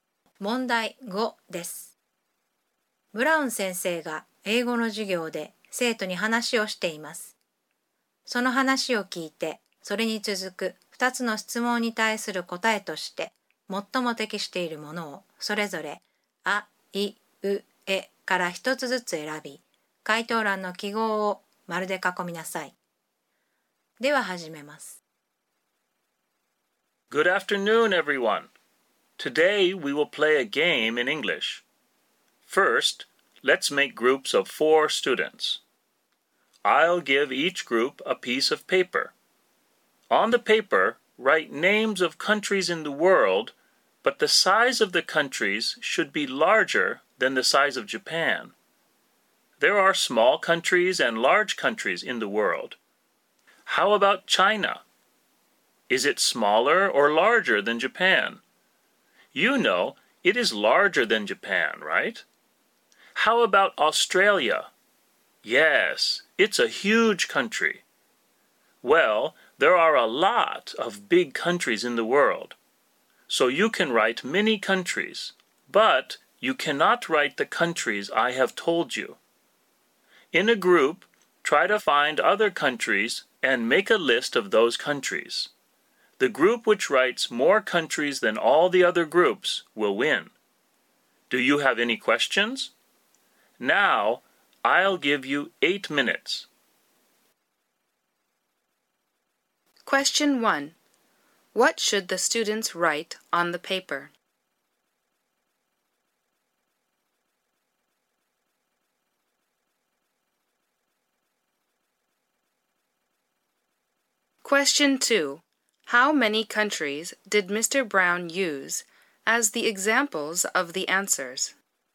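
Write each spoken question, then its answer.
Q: What should the students write on the paper?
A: Names of countries larger than Japan

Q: How many countries did Mr. Brown use as the examples of the answers?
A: Two (China and Australia)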